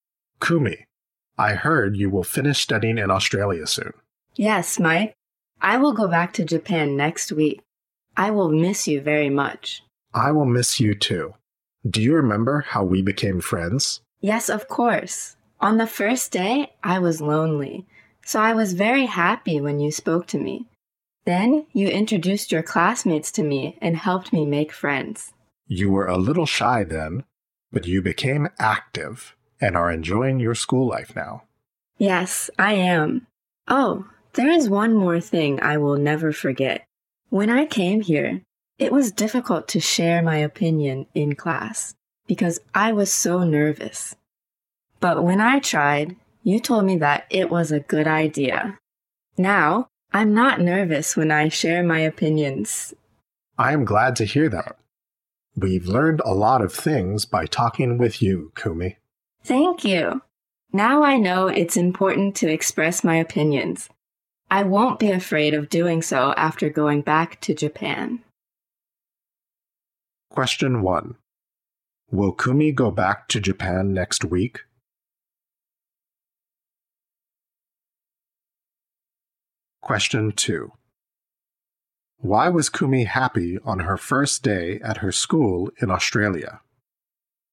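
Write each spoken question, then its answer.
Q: Will Kumi go back to Japan next week?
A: Yes, she will.

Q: Why was Kumi happy on her first day at her school in Australia?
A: Because Mike spoke to her.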